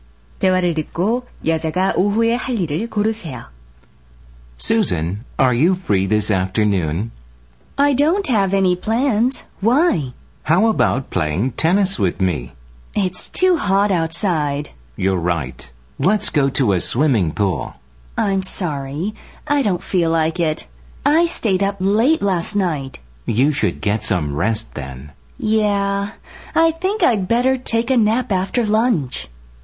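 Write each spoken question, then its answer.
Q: 대화를 듣고 여자가 오후에 할 일을 고르세요.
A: 낮잠 자기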